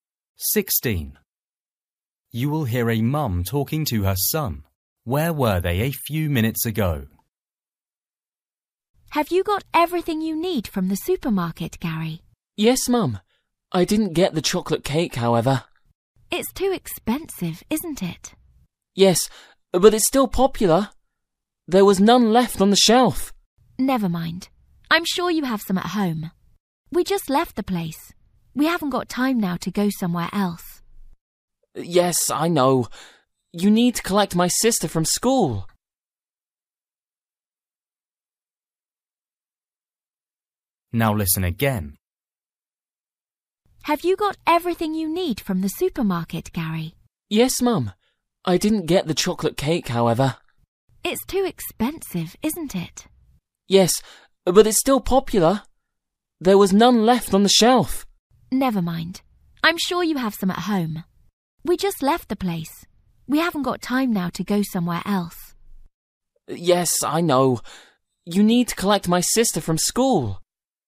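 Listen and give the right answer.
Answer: At the supermarket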